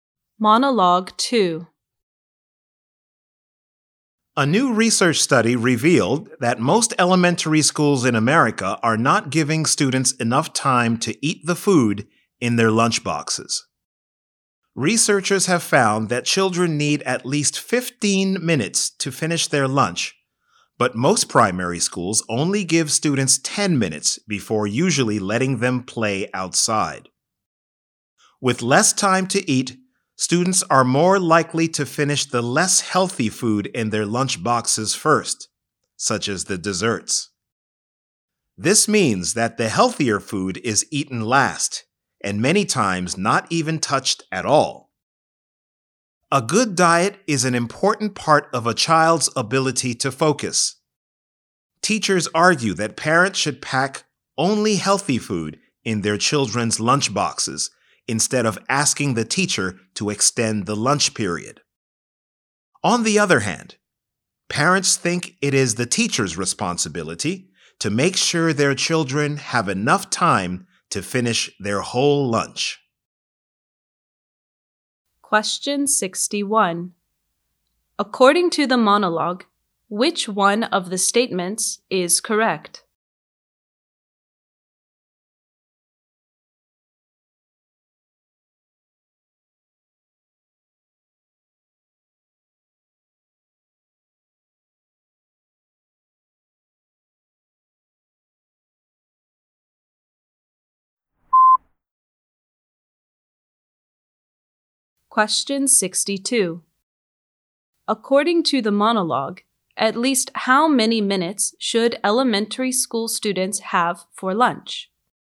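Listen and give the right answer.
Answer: 15 minutes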